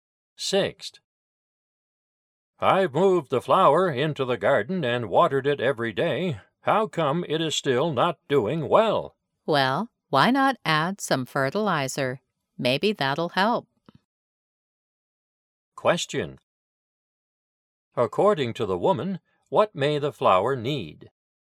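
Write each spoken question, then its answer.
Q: According to the woman, what may the flower need?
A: Fertilizer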